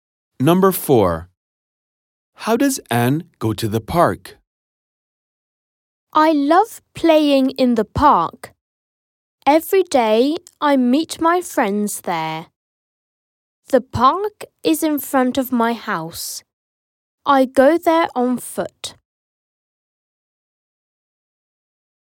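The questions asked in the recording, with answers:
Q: How does Anne go to the park?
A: On foot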